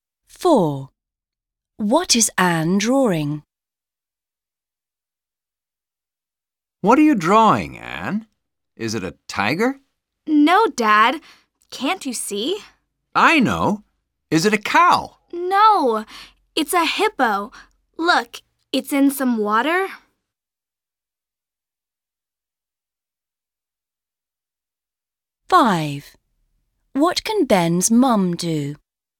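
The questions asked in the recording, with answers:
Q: What is Anne drawing?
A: a hippo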